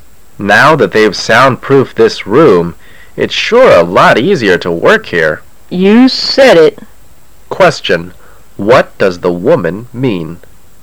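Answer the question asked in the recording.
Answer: She agrees that working there is much easier now.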